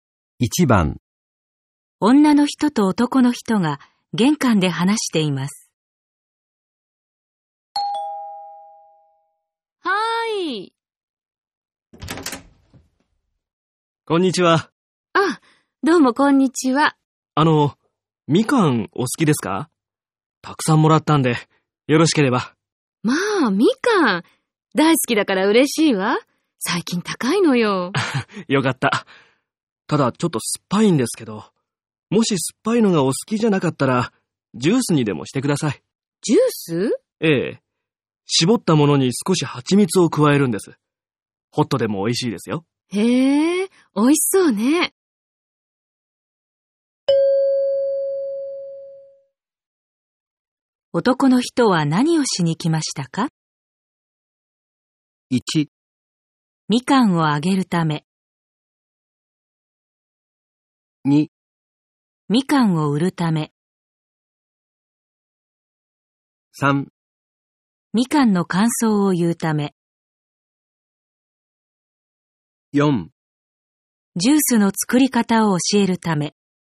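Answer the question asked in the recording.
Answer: 1: みかんをあげるため。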